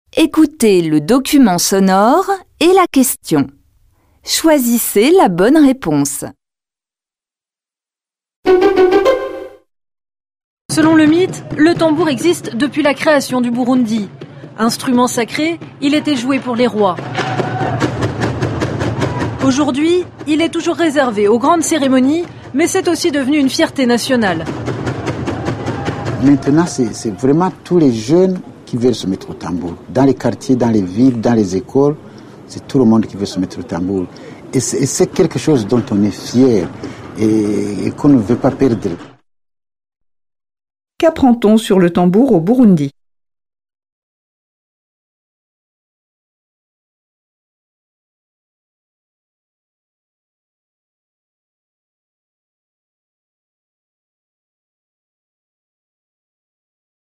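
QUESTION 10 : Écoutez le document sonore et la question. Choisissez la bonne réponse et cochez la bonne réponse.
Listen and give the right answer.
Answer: Instrument sacré autrefois joué pour les rois, il est devenu une fierté nationale que tous les jeunes veulent jouer.

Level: Tăng dần từ trình độ A1 đến C1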